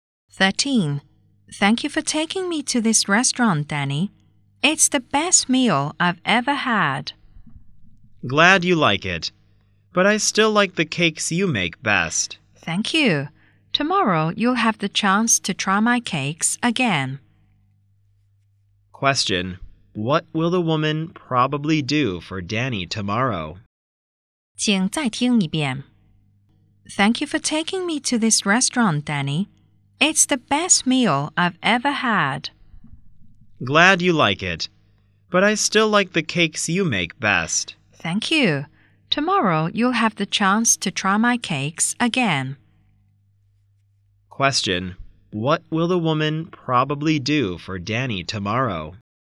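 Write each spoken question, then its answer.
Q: What will the woman probably do for Danny tomorrow?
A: Make cakes for him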